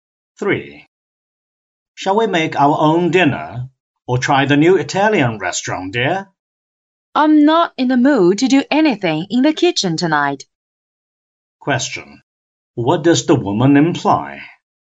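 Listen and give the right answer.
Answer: She wants to eat at the new Italian restaurant.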